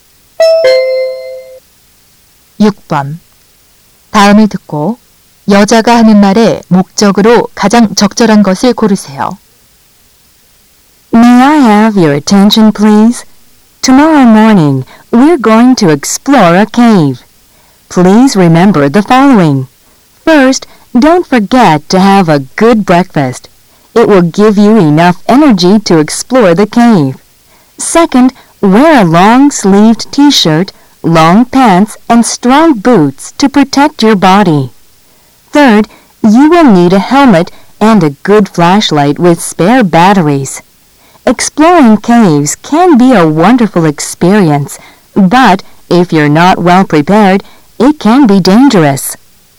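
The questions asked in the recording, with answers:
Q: 다음을 듣고 여자가 하는 말의 목적으로 가장 적절한 것을 고르세요.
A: 동굴 탐험 준비 사항 안내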